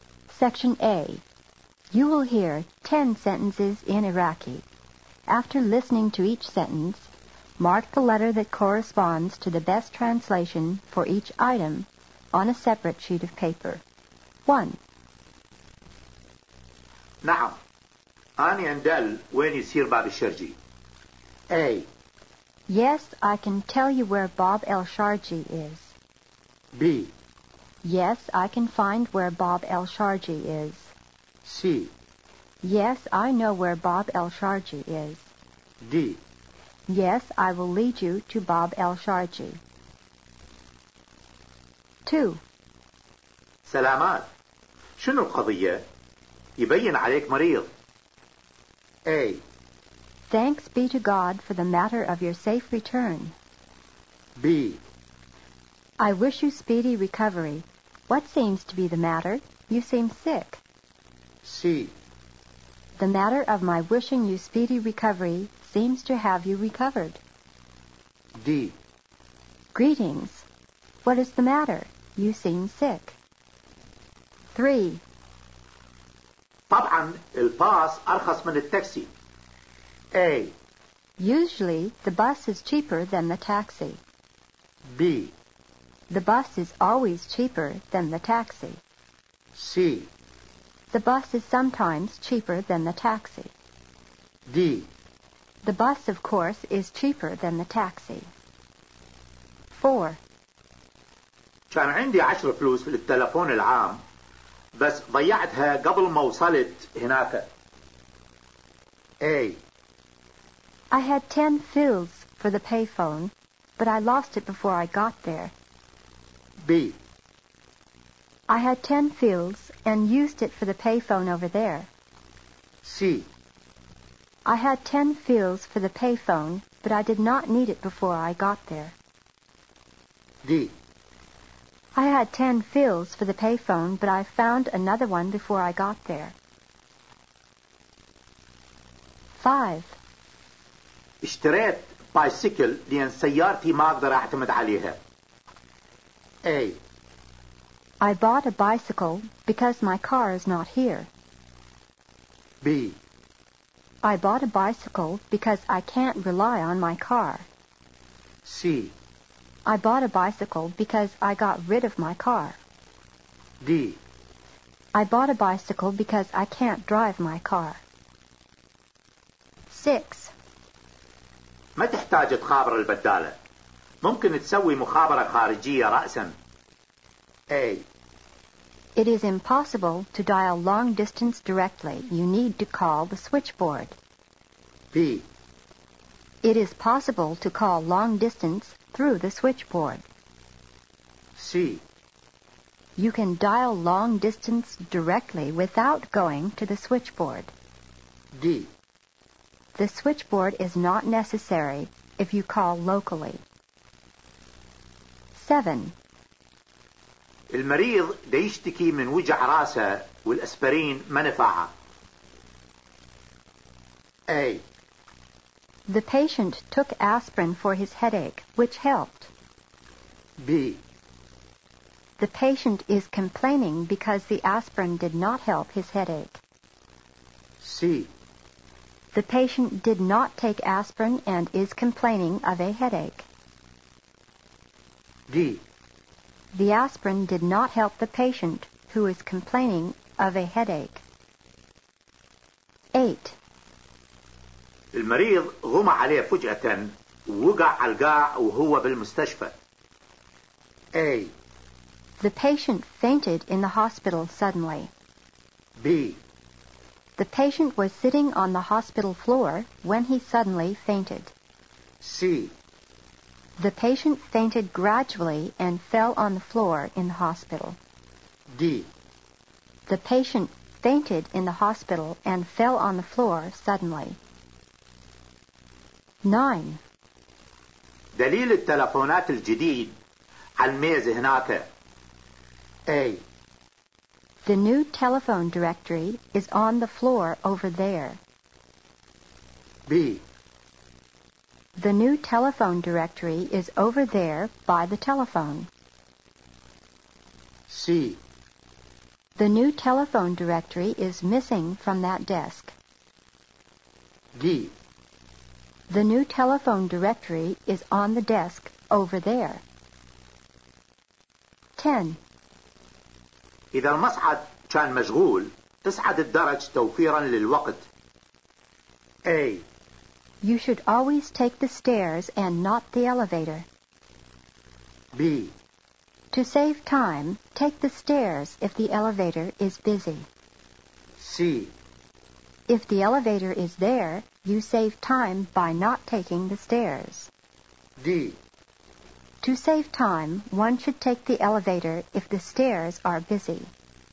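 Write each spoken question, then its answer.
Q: نعم. أنا أندل وين يصير باب الشرجي.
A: C: Yes, I know where Bob El Sharji is.

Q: سلامات. شنو القضية؟ يبين عليك مريض.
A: D: Greetings. What is the matter? You seem sick.

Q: طبعا الباص أرخص من التاكسي.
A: D: The bus, of course, is cheaper than the taxi.

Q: كان عندي 10 فلوس في التلفون العام، بس ضيعتها قبل ما وصلت هناك.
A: A: I had 10 fils for the payphone, but I lost it before I got there.

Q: اشتريت بايسيكل لأن سيارتي ما أقدر أعتمد عليها.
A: B: I bought a bicycle because I can't rely on my car.

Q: ما تحتاج تخابر البدالة. ممكن تسوي مخابرة خارجية رأساً.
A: C: You can dial long distance directly without going to the switchboard.

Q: المريض غمى عليه فجأة ووقع على القاع وهو بالمستشفى.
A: D: The patient fainted in the hospital and fell on the floor suddenly.

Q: دليل التلفونات الجديد على الميز هناك.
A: D: The new telephone directory is on the desk over there.

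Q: إذا المصعد كان مشغول، تصعد الدرج توفيرا للوقت.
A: B: To save time, take the stairs if the elevator is busy.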